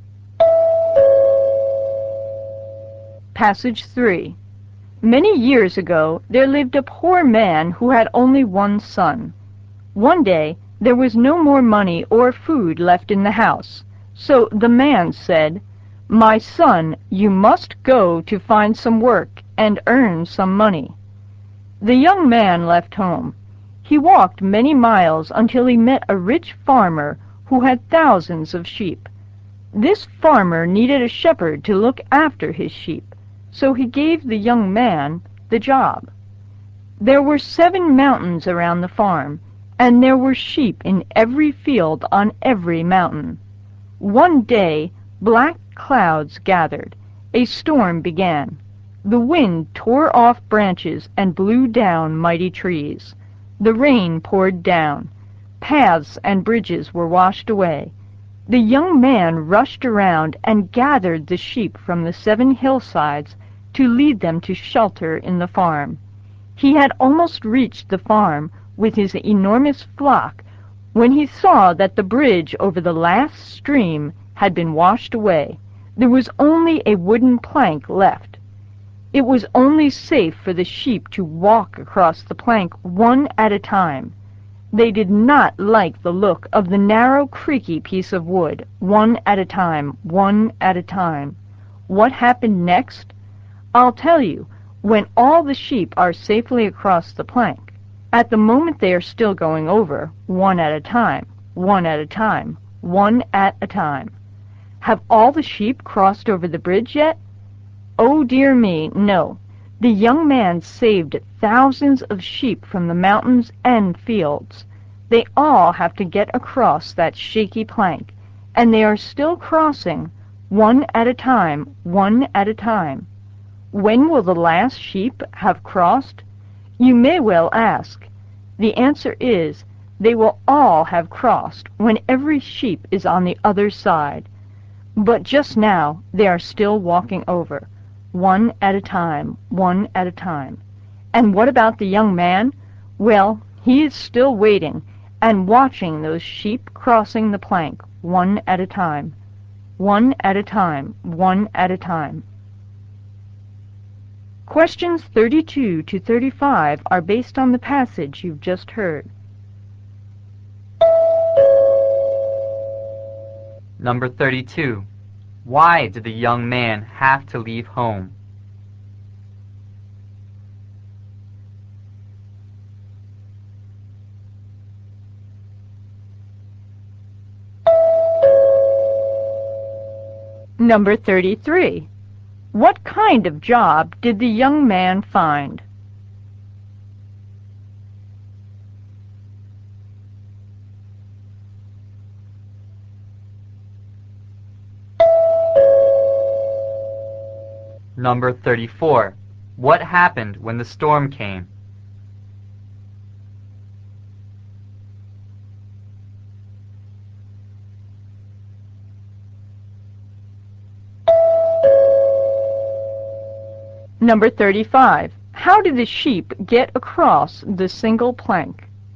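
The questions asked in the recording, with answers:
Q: Why did the young man have to leave home?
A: There was no money or food left, so he had to earn money

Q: What kind of job did the young man find?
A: A shepherd

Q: How did the sheep get across the single plank?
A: One at a time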